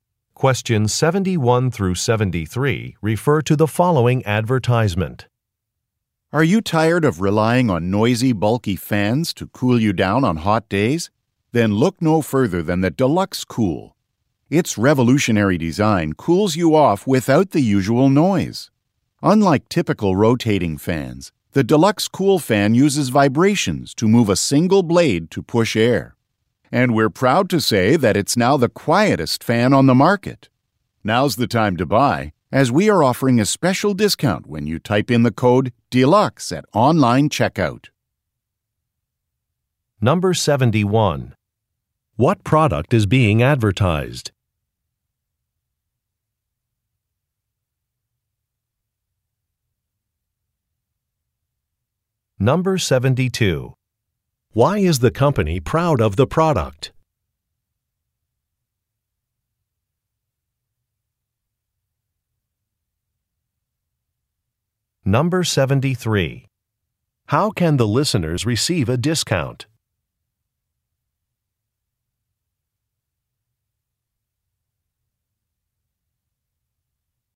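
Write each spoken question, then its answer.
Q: What product is being advertised?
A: A fan (the Deluxe Cool)

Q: Why is the company proud of the product?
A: It is the quietest fan on the market

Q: How can the listeners receive a discount?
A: By typing the code DELUXE at online checkout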